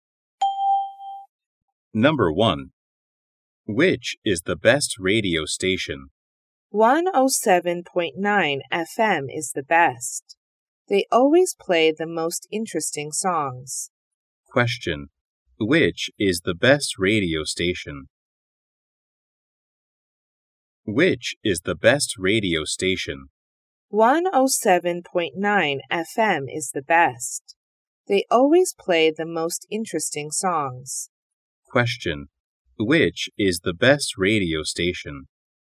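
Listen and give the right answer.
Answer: 107.9 FM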